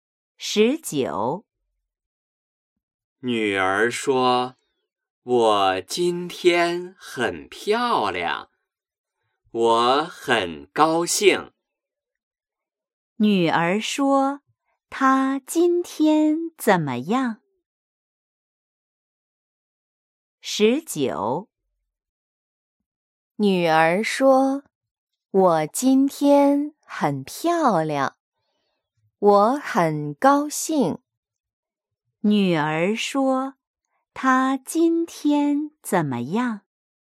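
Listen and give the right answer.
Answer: 很漂亮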